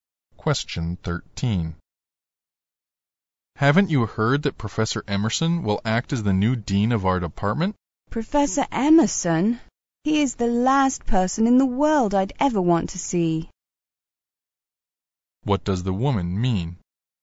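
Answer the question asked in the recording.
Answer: She really doesn't want Professor Emerson as dean.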